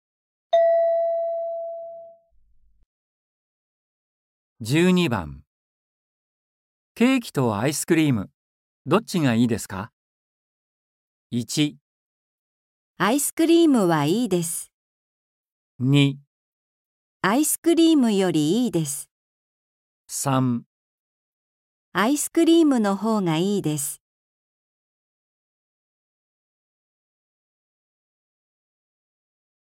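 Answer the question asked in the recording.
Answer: 3

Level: N4.36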